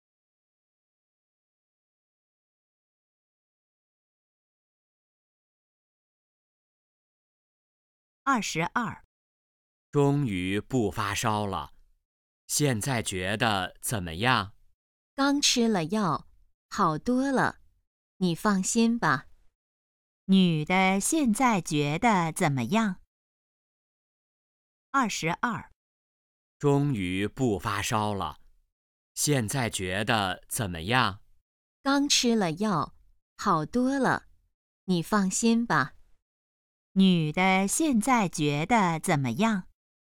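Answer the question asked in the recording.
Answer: 好多了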